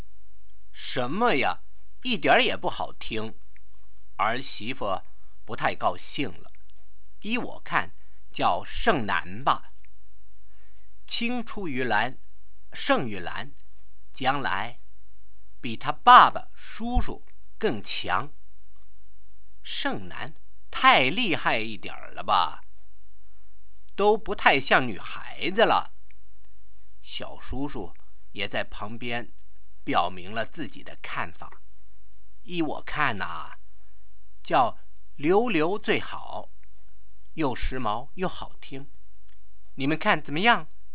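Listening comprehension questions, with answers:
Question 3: What does Shengnan mean?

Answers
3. It means "surpassing men": the mother hopes the girl will outdo her father and uncles and become stronger than them.

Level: 2nd Year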